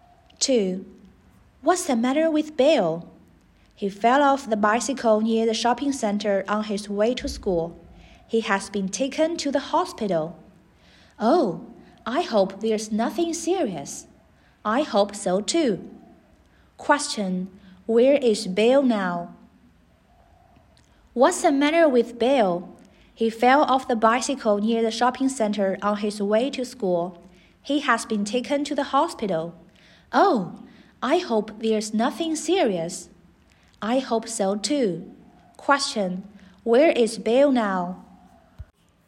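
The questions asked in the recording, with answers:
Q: Question. Where is Bill now?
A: In the hospital.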